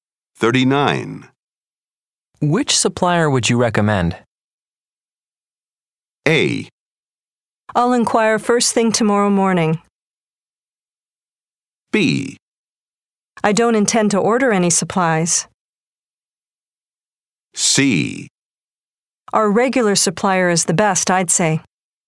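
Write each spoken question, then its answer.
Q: Which supplier would you recommend?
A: C: Our regular supplier is the best, I'd say.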